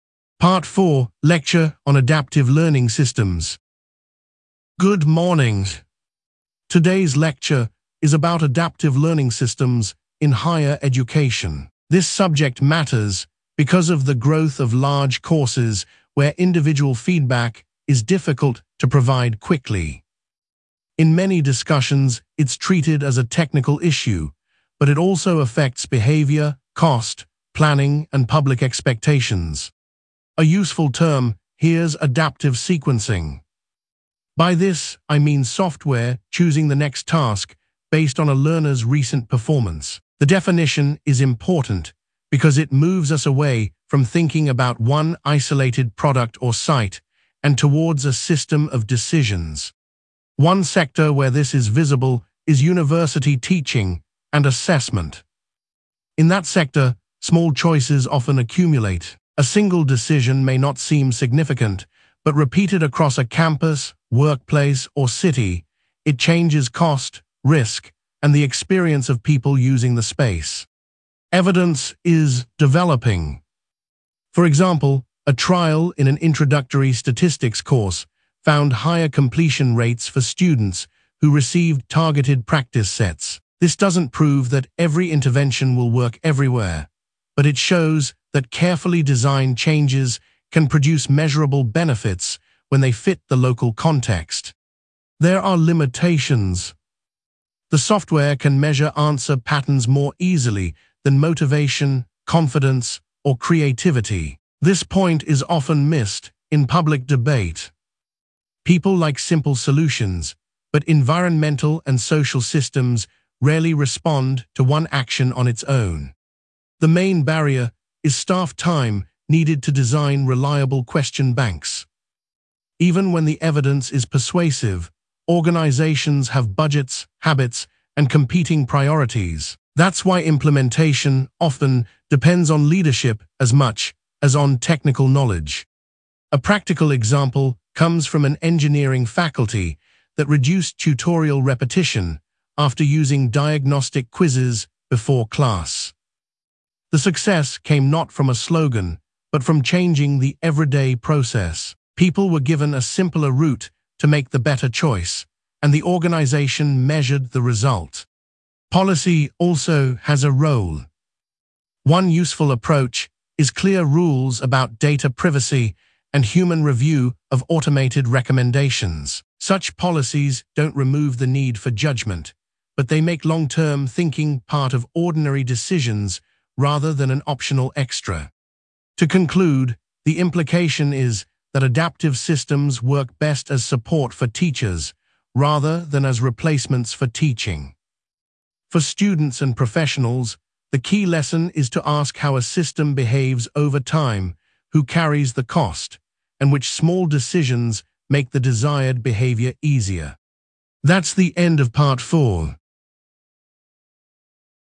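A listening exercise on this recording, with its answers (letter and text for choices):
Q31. What is the main topic of the lecture?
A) adaptive learning systems in higher education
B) the history of public libraries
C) language change in childhood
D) international trade law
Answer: A) adaptive learning systems in higher education

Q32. What primary cause or pressure does the lecturer mention?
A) a fall in student numbers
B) the cost of museum tickets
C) the growth of large courses where individual feedback is difficult to provide quickly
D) a lack of sports facilities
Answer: C) the growth of large courses where individual feedback is difficult to provide quickly

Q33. Which sector is used as an example?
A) fashion retail only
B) university teaching and assessment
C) restaurant advertising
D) private music tuition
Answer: B) university teaching and assessment

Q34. What does the term adaptive sequencing mean?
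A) a short-term publicity campaign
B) a law that bans all development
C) a list of personal preferences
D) software choosing the next task based on a learner's recent performance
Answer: D) software choosing the next task based on a learner's recent performance

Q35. What did the study or survey find?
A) a trial in an introductory statistics course found higher completion rates for students who received targeted practice sets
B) no measurable result at all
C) results only in one classroom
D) a rise in international flights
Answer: A) a trial in an introductory statistics course found higher completion rates for students who received targeted practice sets

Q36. What limitation does the lecturer mention?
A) the topic has never been studied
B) all users reject the idea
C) the software can measure answer patterns more easily than motivation, confidence, or creativity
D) it applies only to children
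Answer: C) the software can measure answer patterns more easily than motivation, confidence, or creativity

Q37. What is identified as the main barrier?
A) lack of weather data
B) staff time needed to design reliable question banks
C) too many volunteers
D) excessive classroom space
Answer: B) staff time needed to design reliable question banks

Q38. What practical example does the lecturer give?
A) a school closing its library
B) a cafe increasing plastic packaging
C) a hospital cancelling training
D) an engineering faculty that reduced tutorial repetition after using diagnostic quizzes before class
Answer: D) an engineering faculty that reduced tutorial repetition after using diagnostic quizzes before class

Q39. What policy approach is mentioned?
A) clear rules about data privacy and human review of automated recommendations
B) removing all inspection rules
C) allowing only voluntary action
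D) banning student research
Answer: A) clear rules about data privacy and human review of automated recommendations

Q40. What is the overall implication?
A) short-term savings matter most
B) technology can replace all staff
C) adaptive systems work best as support for teachers rather than as replacements for teaching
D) individual habits are irrelevant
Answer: C) adaptive systems work best as support for teachers rather than as replacements for teaching

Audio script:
Part 4: Lecture on Adaptive Learning Systems
Lecturer: Good morning. Today's lecture is about adaptive learning systems in higher education. This subject matters because of the growth of large courses where individual feedback is difficult to provide quickly. In many discussions it is treated as a technical issue, but it also affects behaviour, cost, planning, and public expectations.
Lecturer: A useful term here is adaptive sequencing. 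By this I mean software choosing the next task based on a learner's recent performance. The definition is important because it moves us away from thinking about one isolated product or site and towards a system of decisions.
Lecturer: One sector where this is visible is university teaching and assessment. In that sector, small choices often accumulate. A single decision may not seem significant, but repeated across a campus, workplace, or city, it changes cost, risk, and the experience of people using the space.
Lecturer: Evidence is developing. For example, a trial in an introductory statistics course found higher completion rates for students who received targeted practice sets. This does not prove that every intervention will work everywhere, but it shows that carefully designed changes can produce measurable benefits when they fit the local context.
Lecturer: There are limitations. This point is often missed in public debate. 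People like simple solutions, but environmental and social systems rarely respond to one action on its own.
Lecturer: The main barrier is staff time needed to design reliable question banks. Even when the evidence is persuasive, organisations have budgets, habits, and competing priorities. That is why implementation often depends on leadership as much as on technical knowledge.
Lecturer: A practical example comes from an engineering faculty that reduced tutorial repetition after using diagnostic quizzes before class. The success came not from a slogan, but from changing the everyday process. People were given a simpler route to make the better choice, and the organisation measured the result.
Lecturer: Policy also has a role. One useful approach is clear rules about data privacy and human review of automated recommendations. Such policies do not remove the need for judgement, but they make long-term thinking part of ordinary decisions rather than an optional extra.
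Lecturer: To conclude, the implication is that adaptive systems work best as support for teachers rather than as replacements for teaching. For students and professionals, the key lesson is to ask how a system behaves over time, who carries the cost, and which small decisions make the desired behaviour easier.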